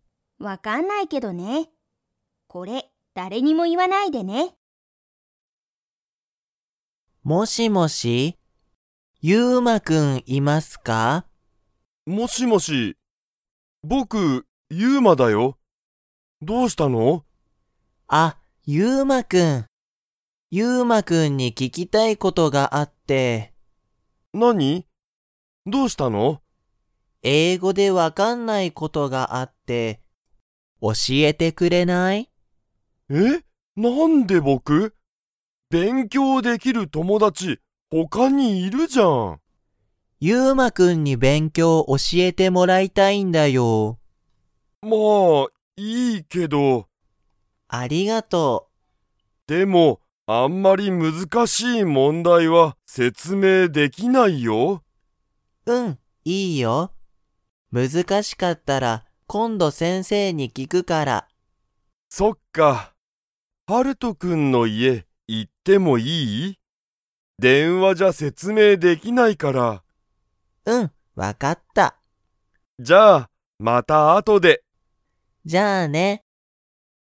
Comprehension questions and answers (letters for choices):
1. はるとは、ゆうまに____。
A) 勉強(べんきょう)してほしい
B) 聞(き)きたいことがある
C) 家(いえ)にいてほしい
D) 説明(せつめい)できない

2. ゆうまは、はるとに電話(でんわ)で説明(せつめい)しますか?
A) はい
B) いいえ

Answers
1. B
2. B

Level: Level 2